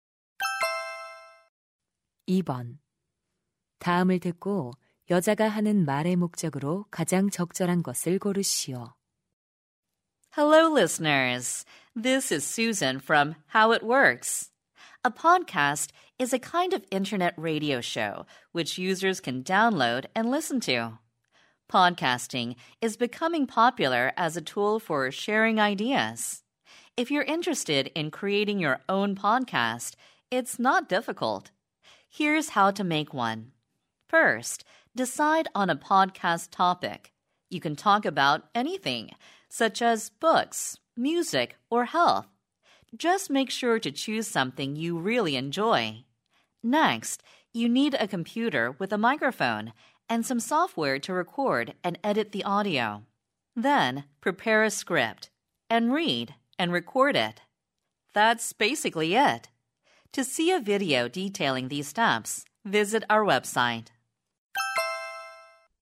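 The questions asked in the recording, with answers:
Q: 다음을 듣고 여자가 하는 말의 목적으로 가장 적절한 것을 고르시오.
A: 팟캐스트 만드는 방법을 안내하려고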